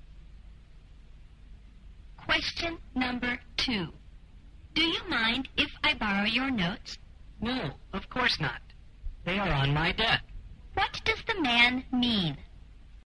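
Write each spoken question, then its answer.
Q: What does the man mean?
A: He is happy to lend his notes; they are on his desk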